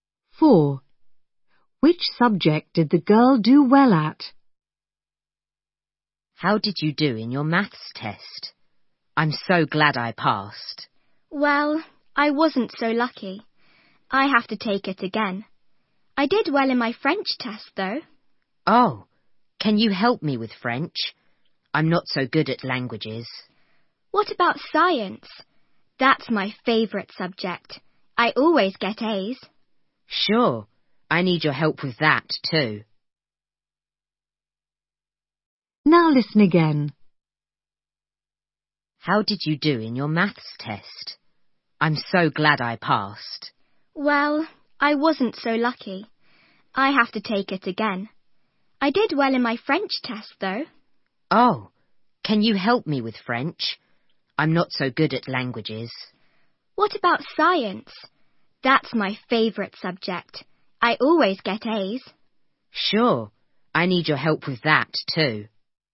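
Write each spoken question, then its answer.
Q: Which subject did the girl do well at?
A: French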